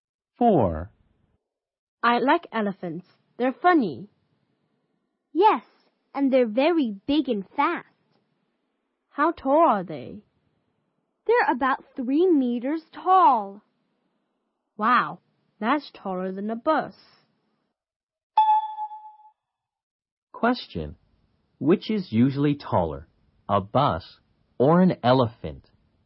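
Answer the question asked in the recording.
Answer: An elephant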